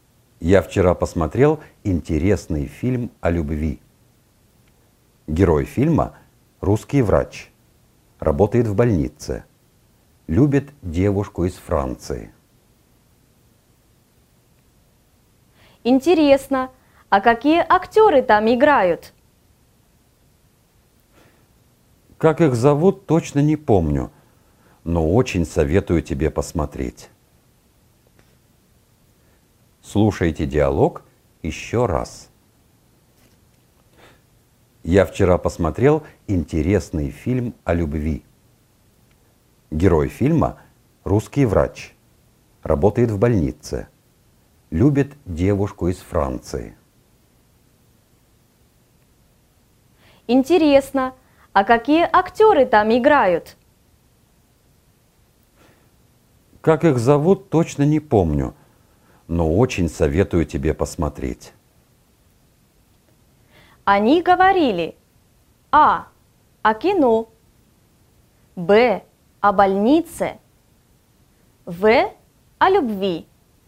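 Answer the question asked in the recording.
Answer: А: о кино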